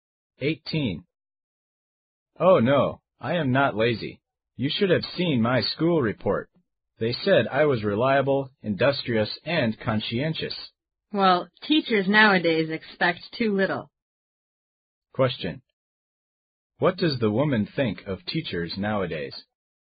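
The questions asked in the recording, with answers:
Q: What does the woman think of teachers nowadays?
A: They expect too little of students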